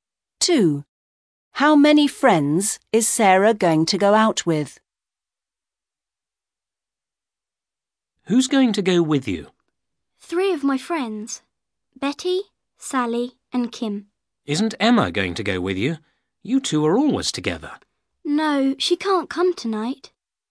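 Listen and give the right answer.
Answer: Three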